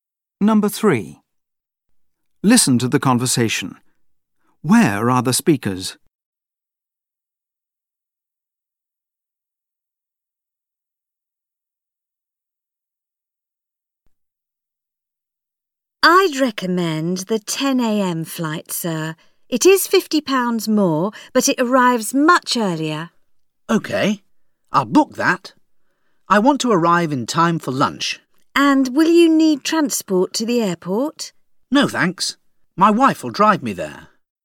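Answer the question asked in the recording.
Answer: At a travel agency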